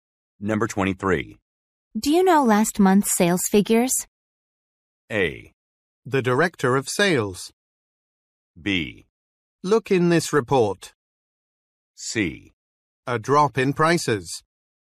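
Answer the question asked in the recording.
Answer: B: Look in this report.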